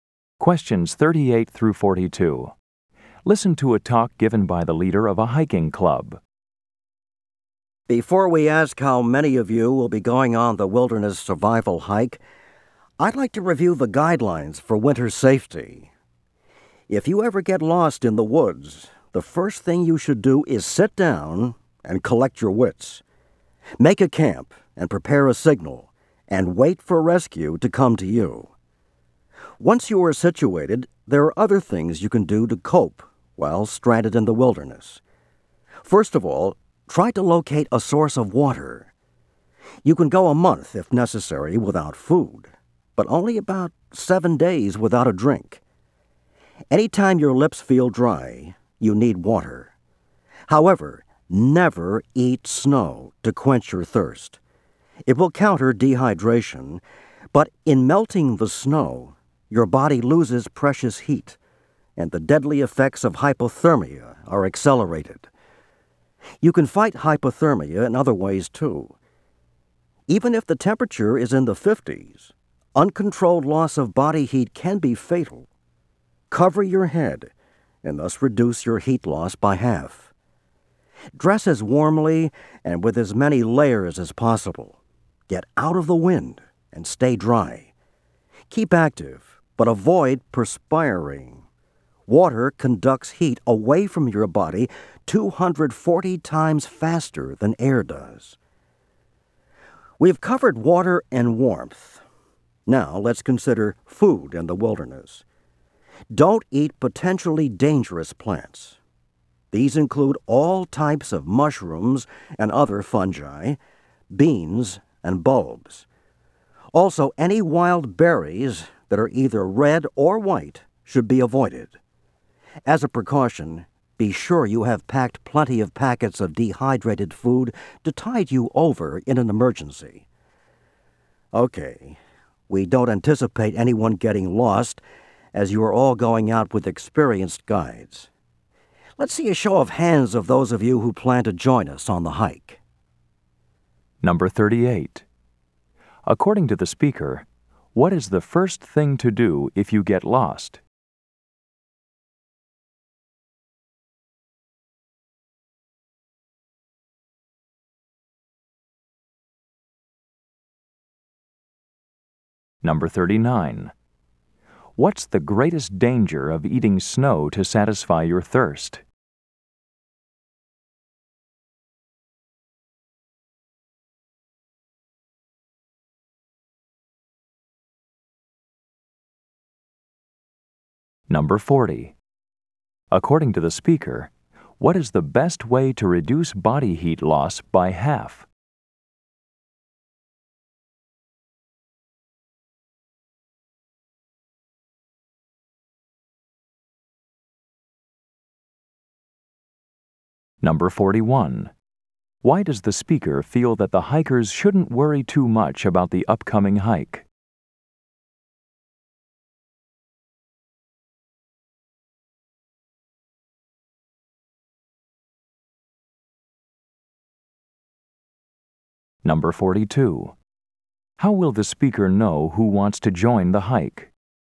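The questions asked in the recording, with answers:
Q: According to the speaker, what is the first thing to do if you get lost?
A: Sit down and collect your wits

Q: What's the greatest danger of eating snow to satisfy your thirst?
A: It speeds up hypothermia because the body loses heat melting it

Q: According to the speaker, what is the best way to reduce body heat loss by half?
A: Cover your head

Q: Why does the speaker feel that the hikers shouldn't worry too much about the upcoming hike?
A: They are all going out with experienced guides

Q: How will the speaker know who wants to join the hike?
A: By a show of hands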